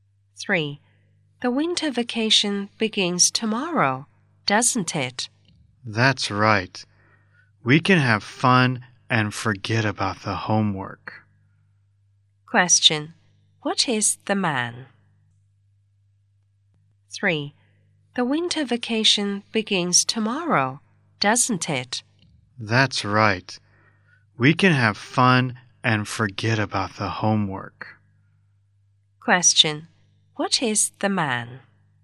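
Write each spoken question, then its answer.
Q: What is the man?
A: A student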